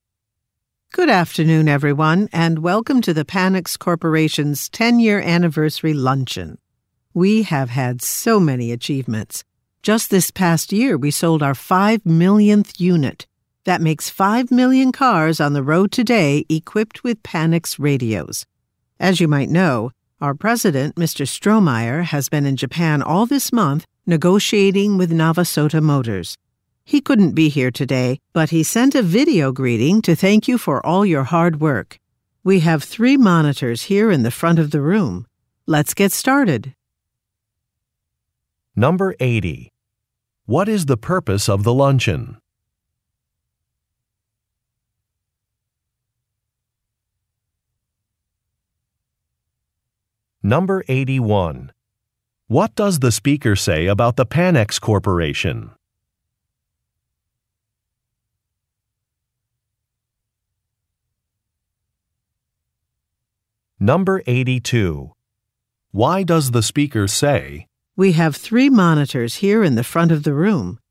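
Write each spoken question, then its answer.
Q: What is the purpose of the luncheon?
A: To celebrate the company's 10-year anniversary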